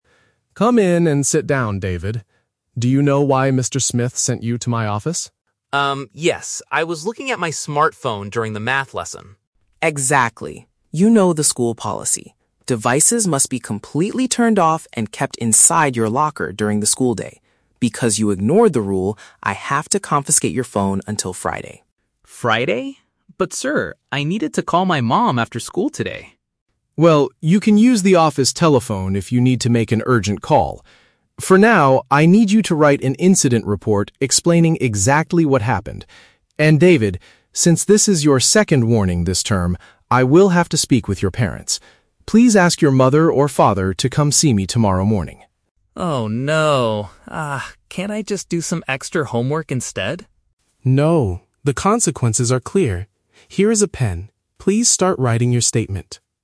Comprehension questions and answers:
Listen to a conversation between a school supervisor and a student, and choose the correct answer (A, B, or C) for each question.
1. Why was the student sent to the supervisor's office?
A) He forgot to do his math homework.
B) He used an electronic device in class.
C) He lost the key to his school locker.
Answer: He used an electronic device in class.

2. What will happen to the student's phone?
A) The school will keep it until the end of the week.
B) He can use it briefly to call his mother later.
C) It will be given back to his parents tomorrow.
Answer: The school will keep it until the end of the week.

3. What does the supervisor ask the student to do right now?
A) Use the office phone to call his father.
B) Complete some extra math exercises.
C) Write down a description of his mistake.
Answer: Write down a description of his mistake.

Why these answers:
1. The student admits he was "looking at my smartphone during the math lesson." "Electronic device" is a synonym for smartphone. Trap Analysis: Option (A) is a trap. "Math" is mentioned as the class he was in, but he was not punished for forgetting homework. Option (C) is a trap. "Locker" is mentioned as the place where the phone should be, but he didn't lose his key.
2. The supervisor states, "I have to confiscate your phone until Friday." "Keep it until the end of the week" is a paraphrase of confiscating it until Friday. Trap Analysis: Option (B) is a trap. The student wants to call his mother, but the supervisor tells him to use the "office telephone," not his own phone. Option (C) is a trap. His parents are coming tomorrow, but the phone is kept until Friday.
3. The supervisor tells him to "write an incident report explaining exactly what happened" and later says, "start writing your statement." Trap Analysis: Option (A) is a trap. Calling parents is mentioned, but he is told to ask them to come tomorrow, not to call his father right now. Option (B) is a trap. The student asks, "can't I just do some extra homework instead?" but the supervisor says "No."

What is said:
Supervisor: "Come in and sit down, David. Do you know why Mr. Smith sent you to my office?"
Student: "Um, yes. I was looking at my smartphone during the math lesson."
Supervisor: "Exactly. You know the school policy. Devices must be completely turned off and kept inside your locker during the school day. Because you ignored the rule, I have to confiscate your phone until Friday."
Student: "Friday? But, sir, I need it to call my mom after school today!"
Supervisor: "Well, you can use the office telephone if you need to make an urgent call. For now, I need you to write an incident report explaining exactly what happened. And David, since this is your second warning this term, I will have to speak with your parents. Please ask your mother or father to come see me tomorrow morning."
Student: "Oh, no... Ah, can't I just do some extra homework instead?"
Supervisor: "No, the consequences are clear. Here is a pen. Please start writing your statement."

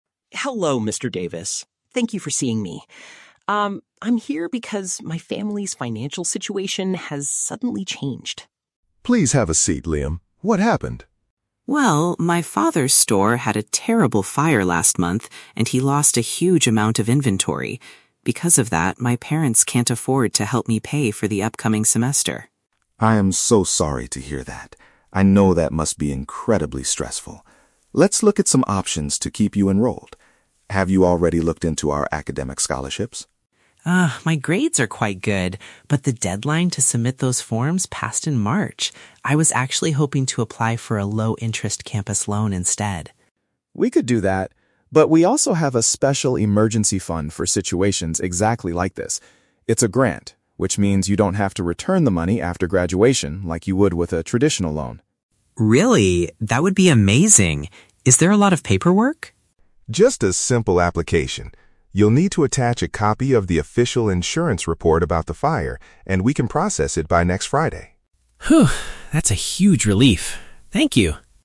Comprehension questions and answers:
Listen to a conversation between a university student and a financial aid officer, then choose the correct answer (A, B, or C) for each question.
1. Why does the student suddenly need financial assistance?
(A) His parents were recently fired from their jobs.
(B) His family's business suffered unexpected damage.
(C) He needs to purchase expensive books for his new classes.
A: His family's business suffered unexpected damage.

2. Why can't the student receive an academic scholarship?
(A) It is too late to hand in the required paperwork.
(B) His recent test scores and grades are not high enough.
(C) The university only offers them to first-year students.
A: It is too late to hand in the required paperwork.

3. What is the main advantage of the emergency fund offered by the officer?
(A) It provides a traditional low-interest loan for students.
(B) The school will give him physical cash on the very same day.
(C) The student will not owe the university any money later.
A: The student will not owe the university any money later.

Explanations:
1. Liam explains that his "father's store had a terrible fire" and lost inventory. This means his family's business suffered damage.
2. Liam states that "the deadline to submit those forms passed in March." "Too late to hand in the paperwork" is a paraphrase of missing the deadline.
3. The officer explains that the fund is a grant, meaning "you don't have to return the money after graduation." If you don't have to return it, you do not owe any money later.

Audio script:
Liam: Hello, Mr. Davis. Thank you for seeing me. Um, I'm here because my family's financial situation has suddenly changed.
Mr. Davis: Please have a seat, Liam. What happened?
Liam: Well, my father's store had a terrible fire last month, and he lost a huge amount of inventory. Because of that, my parents can't afford to help me pay for the upcoming semester.
Mr. Davis: I am so sorry to hear that. I know that must be incredibly stressful. Let's look at some options to keep you enrolled. Have you already looked into our academic scholarships?
Liam: Ah, my grades are quite good, but the deadline to submit those forms passed in March. I was actually hoping to apply for a low-interest campus loan instead.
Mr. Davis: We could do that, but we also have a special emergency fund for situations exactly like this. It's a grant, which means you don't have to return the money after graduation like you would with a traditional loan.
Liam: Really? That would be amazing. Is there a lot of paperwork?
Mr. Davis: Just a simple application. You'll need to attach a copy of the official insurance report about the fire, and we can process it by next Friday.
Liam: Phew, that's a huge relief. Thank you!

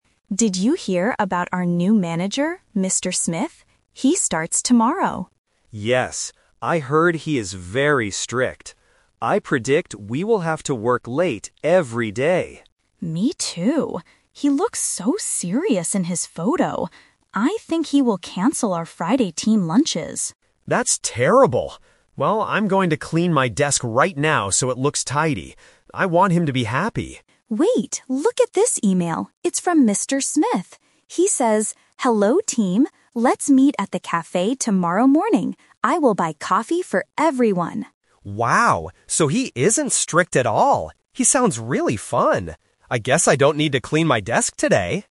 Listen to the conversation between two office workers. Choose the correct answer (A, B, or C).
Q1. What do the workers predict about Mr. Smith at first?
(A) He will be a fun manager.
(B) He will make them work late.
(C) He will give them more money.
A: He will make them work late.

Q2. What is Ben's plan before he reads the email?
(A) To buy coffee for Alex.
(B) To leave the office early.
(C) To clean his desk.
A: To clean his desk.

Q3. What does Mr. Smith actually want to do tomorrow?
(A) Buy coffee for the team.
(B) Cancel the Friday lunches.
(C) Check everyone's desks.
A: Buy coffee for the team.

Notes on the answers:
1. Ben clearly says, "I predict we will have to work late every day." Trap: Option (A) is a trap because this is how they feel at the end of the conversation, not their first prediction. Option (C) is a positive thing, but they were predicting negative things.
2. Ben is worried about the strict boss, so he says, "I'm going to clean my desk right now so it looks tidy." Trap: Option (A) is a "Person Trap" – the boss is going to buy coffee, not Ben. Option (B) is not mentioned in the audio.
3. Alex reads the email from the boss, which says, "I will buy coffee for everyone!" Trap: Option (B) is the classic A2 "Twist" trap. Canceling lunches was just Alex's bad prediction earlier, not what the boss actually does. Option (C) is related to Ben's fear, but the boss never says he will check desks.

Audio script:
Alex: Did you hear about our new manager, Mr. Smith? He starts tomorrow.
Ben: Yes. I heard he is very strict. I predict we will have to work late every day.
Alex: Me too. He looks so serious in his photo. I think he will cancel our Friday team lunches.
Ben: That's terrible. Well, I'm going to clean my desk right now so it looks tidy. I want him to be happy.
Alex: Wait, look at this email! It's from Mr. Smith. He says: "Hello team, let's meet at the cafe tomorrow morning. I will buy coffee for everyone!"
Ben: Wow! So he isn't strict at all. He sounds really fun! I guess I don't need to clean my desk today!

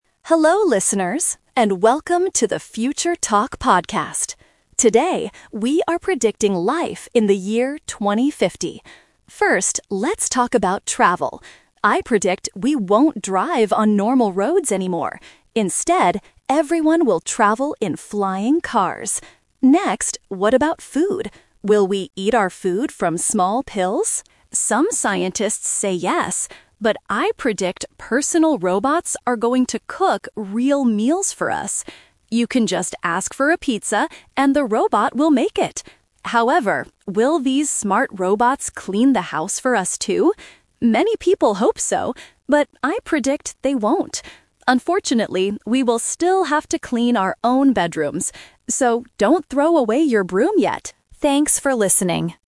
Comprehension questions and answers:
Listen to the podcast about the year 2050. Choose the correct answer (A, B, or C).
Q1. How does the host predict we will travel in 2050?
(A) We will use flying cars.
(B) We will drive faster on roads.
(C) We will travel in giant buses.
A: We will use flying cars.

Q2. What does the host think we will eat in the future?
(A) Small food pills.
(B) Real meals cooked by robots.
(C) Only fast food like pizza.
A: Real meals cooked by robots.

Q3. What will people STILL have to do in 2050?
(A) Cook their own food.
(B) Fix their flying cars.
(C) Clean their own bedrooms.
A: Clean their own bedrooms.

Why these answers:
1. The host clearly states, "Instead, everyone will travel in flying cars!"
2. The host says, "I predict personal robots are going to cook real meals for us."
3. At the end, the host predicts robots won't do all the housework, saying, "we will still have to clean our own bedrooms."

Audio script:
Hello listeners, and welcome to the 'Future Talk' podcast! Today, we are predicting life in the year 2050. First, let's talk about travel. I predict we won't drive on normal roads anymore. Instead, everyone will travel in flying cars!
Next, what about food? Will we eat our food from small pills? Some scientists say yes, but I predict personal robots are going to cook real meals for us. You can just ask for a pizza, and the robot will make it!
However, will these smart robots clean the house for us, too? Many people hope so, but I predict they won't. Unfortunately, we will still have to clean our own bedrooms. So, don't throw away your broom yet! Thanks for listening.

